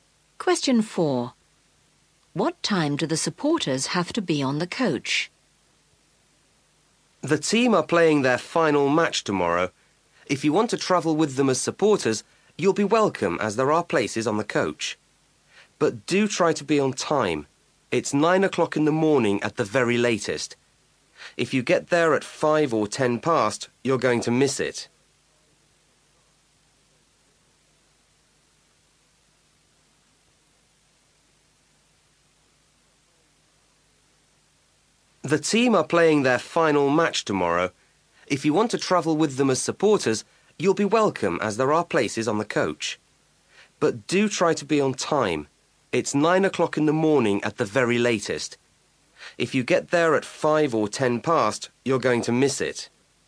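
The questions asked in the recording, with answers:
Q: What time do the supporters have to be on the coach?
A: 9 o'clock in the morning at the latest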